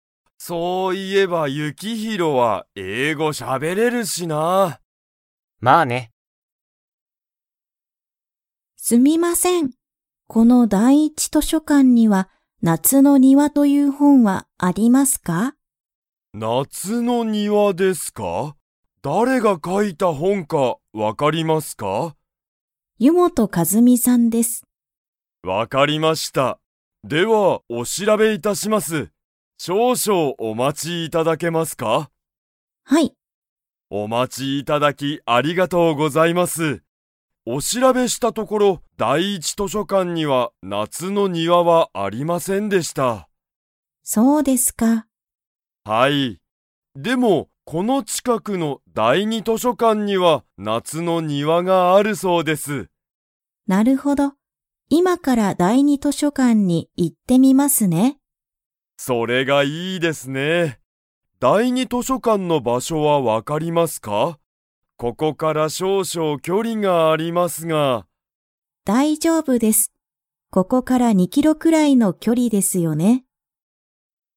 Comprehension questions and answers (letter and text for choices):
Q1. 「夏なつの庭にわ」という本ほんは、第一だいいち図書館としょかんに 。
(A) ある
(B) ない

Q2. 第二だいに図書館としょかんは、リサのいるところから の距離きょりにある。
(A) 1キロ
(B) 2キロ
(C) 3キロ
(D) 4キロ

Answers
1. (B) ない
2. (B) 2キロ

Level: Level 4